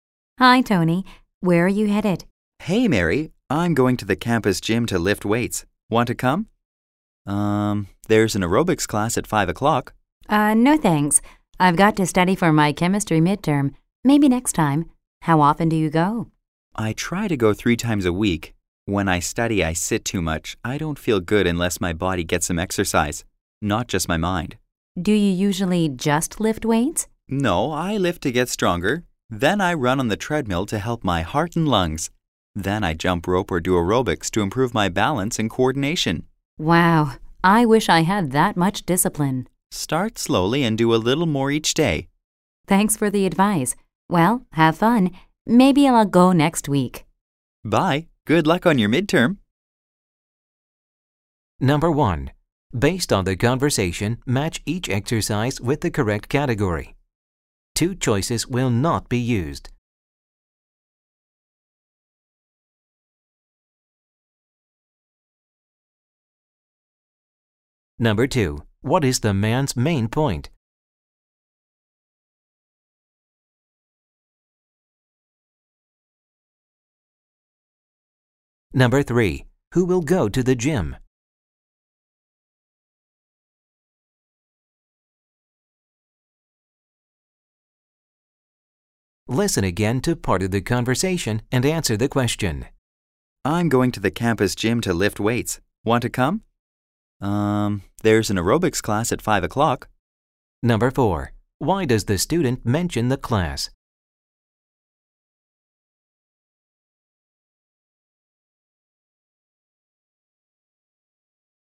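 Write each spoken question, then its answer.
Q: Who will go to the gym?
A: Tony, the man

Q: Why does the student mention the class?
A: To invite Mary to come to the gym with him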